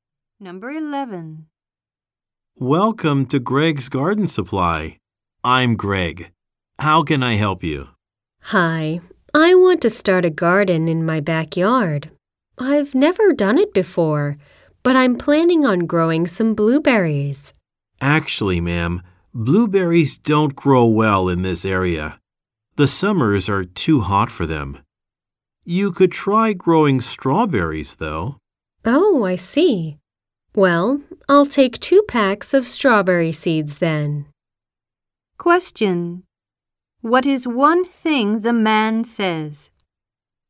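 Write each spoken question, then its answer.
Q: What is one thing the man says?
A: Blueberries don't grow well in the area because summers are too hot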